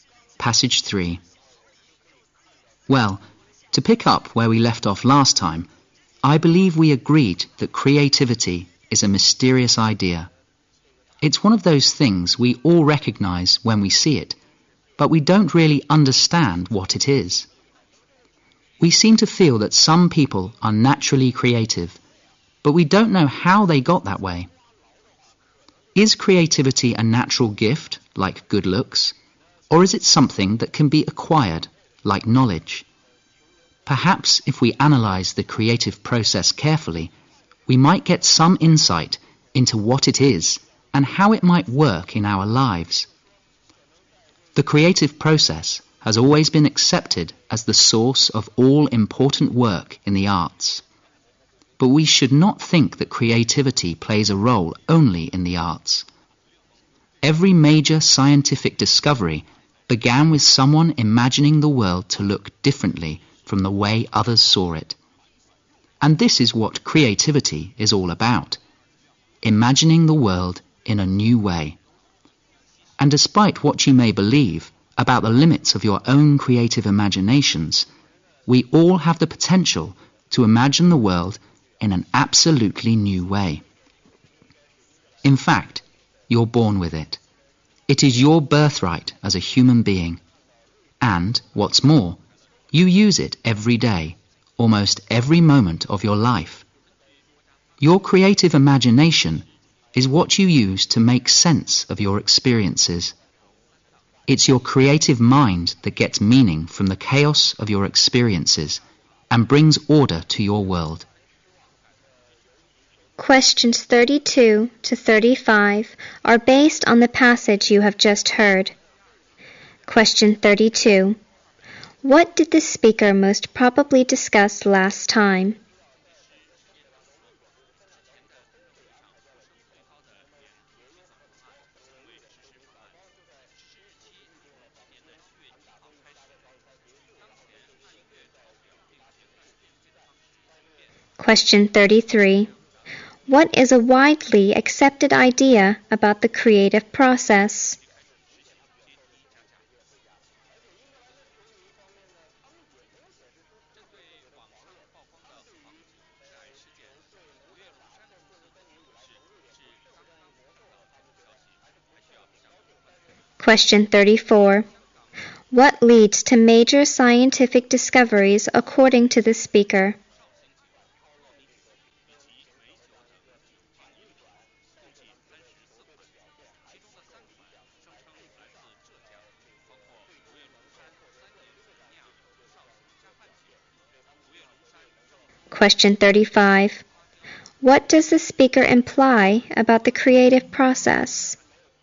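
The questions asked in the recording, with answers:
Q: What did the speaker most probably discuss last time?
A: That creativity is a mysterious idea

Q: What is a widely accepted idea about the creative process?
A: It is the source of all important work in the arts

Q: What leads to major scientific discoveries according to the speaker?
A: Imagining the world differently from others

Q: What does the speaker imply about the creative process?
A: Everyone has it and uses it every day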